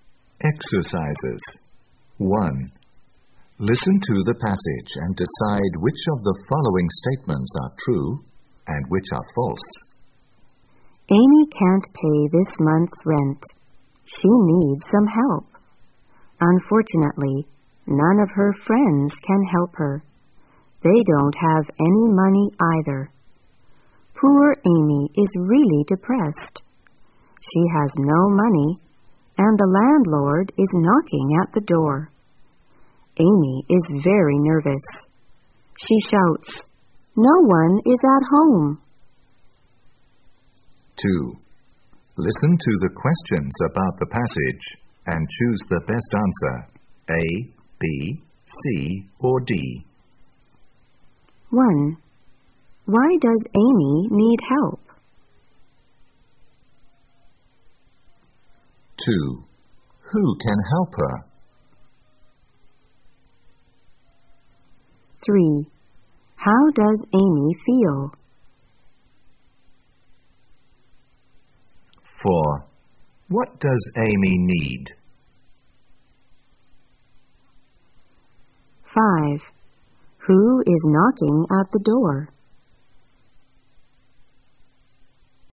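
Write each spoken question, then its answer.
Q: Why does Amy need help?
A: She can't pay this month's rent.

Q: Who can help her?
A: None of her friends can help her.

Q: How does Amy feel?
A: Depressed and nervous.

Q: What does Amy need?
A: Money to pay the rent.

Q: Who is knocking at the door?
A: The landlord.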